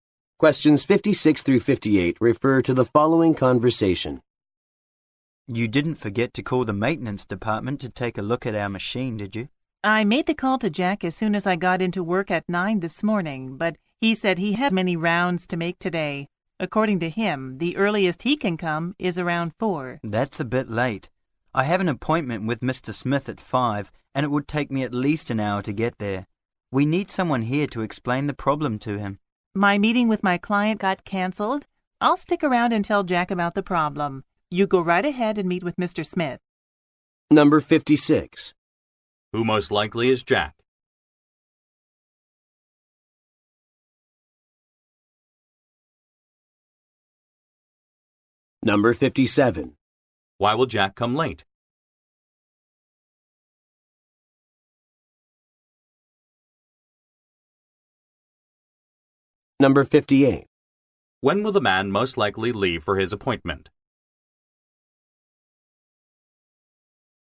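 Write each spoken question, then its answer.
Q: Who most likely is Jack?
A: A maintenance worker

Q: Why will Jack come late?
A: He has many rounds to make today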